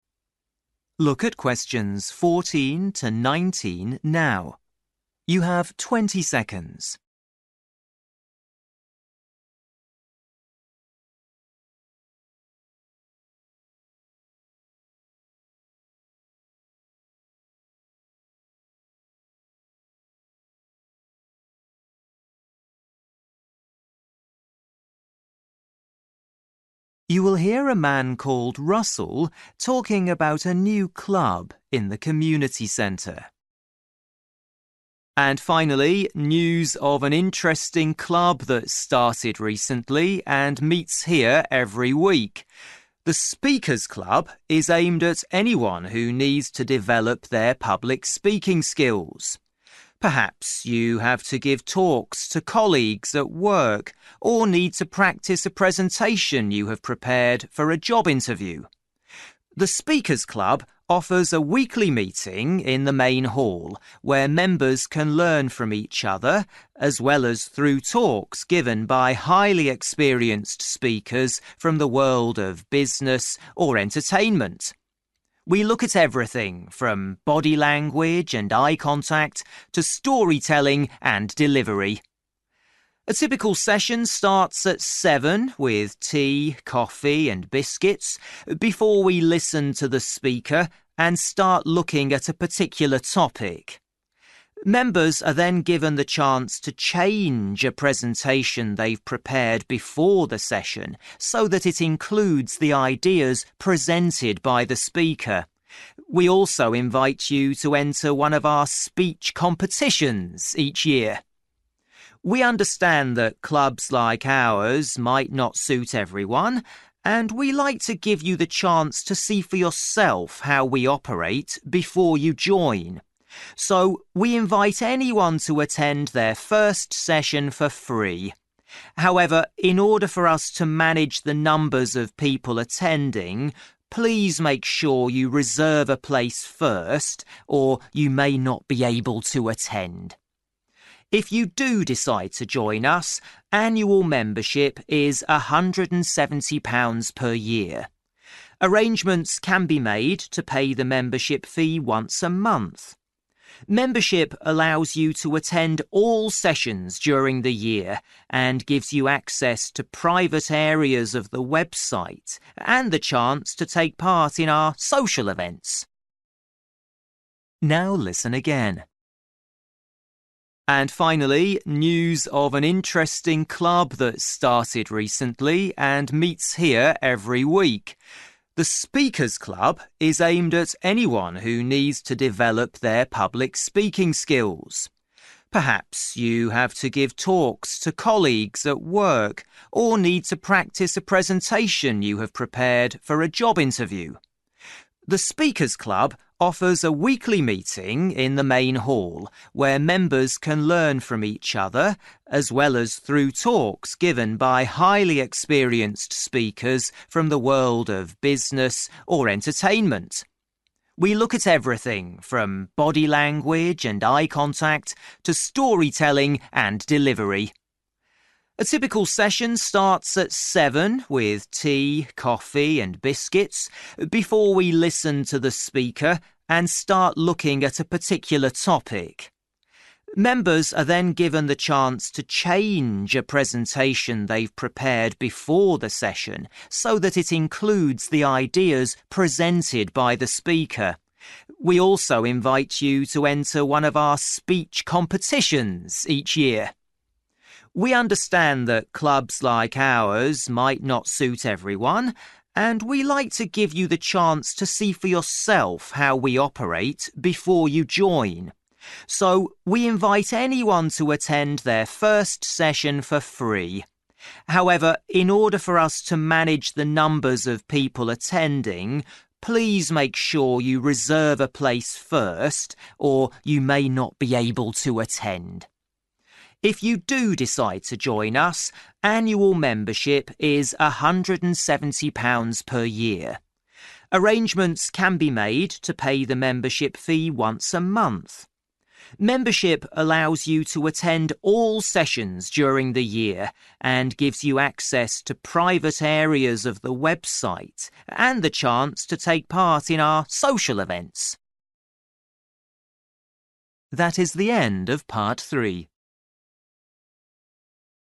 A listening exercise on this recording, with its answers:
For each question, write the correct answer in the gap. Write one or two words or a number or a date or a time.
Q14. For business presentations to colleagues or to get ready for an (14) ....................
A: interview

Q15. Workshop leaders have a background in business or (15) ....................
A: entertainment

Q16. Sessions start at (16) ....................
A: 7.00/7pm/7 o'clock

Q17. Members are invited to try one of our (17) .................... once a year.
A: speech competitions

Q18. The first meeting is (18) .................... but remember to reserve a place.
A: free

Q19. Membership costs (19) .................... per year or payment can be made each month.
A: £170

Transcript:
Russell: And finally, news of an interesting club that started recently and meets here every week. The Speakers· Club is aimed at anyone who needs to develop their public speaking skills. Perhaps you have to give talks to colleagues at work or need to practise a presentation you have prepared for a job interview.
The Speakers· Club offers a weekly meeting in the main hall, where members can learn from each other as well as through talks given by highly experienced speakers from the world of business or entertainment. We look at everything from body language and eye contact to storytelling and delivery.
A typical session starts at 7.00 with tea, coffee and biscuits before we listen to the speaker and start looking at a particular topic. Members are then given the chance to change a presentation they've prepared before the session so that it includes the ideas presented by the speaker. We also invite you to enter one of our speech competitions each year.
We understand that clubs like ours might not suit everyone and we like to give you the chance to see for yourself how we operate before you join. So, we invite anyone to attend their first session for free. However, in order for us to manage the numbers of people attending, please make sure you reserve a place first or you may not be able to attend.
If you do decide to join us, annual membership is £170 per year. Arrangements can be made to pay the membership fee once a month. Membership allows you to attend all sessions during the year and gives you access to private areas of the website and the chance to take part in our social events.
Now listen again.

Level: PET (B1)